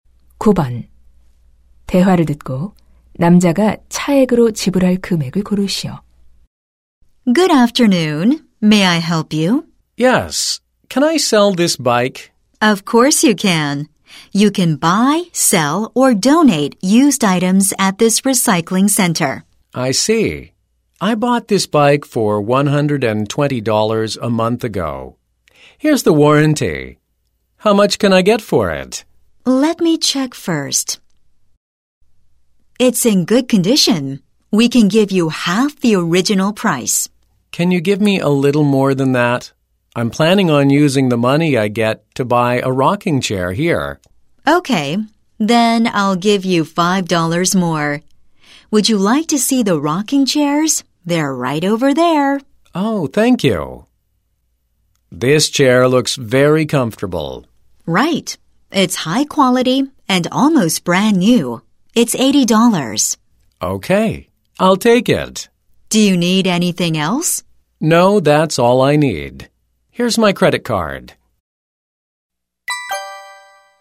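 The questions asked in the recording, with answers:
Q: 대화를 듣고 남자가 차액으로 지불할 금액을 고르시오.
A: $15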